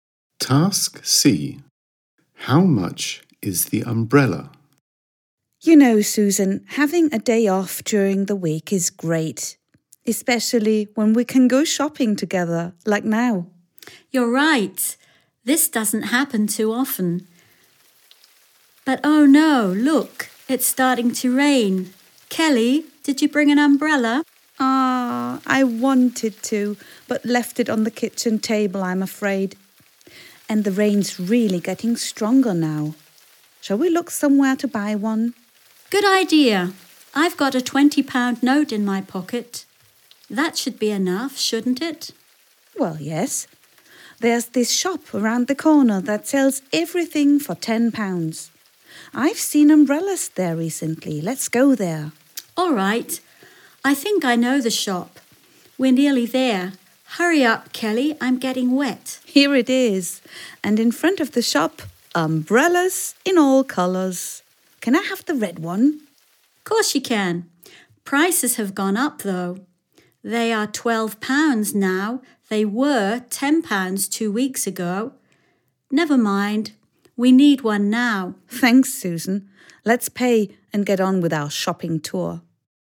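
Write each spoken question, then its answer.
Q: How much is the umbrella?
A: £12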